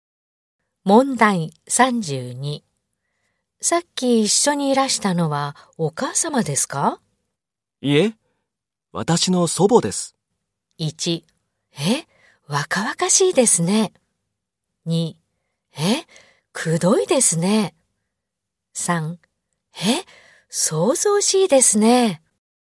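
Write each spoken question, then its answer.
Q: さっき一緒にいらしたのはお母様ですか?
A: 1: え、若々しいですね。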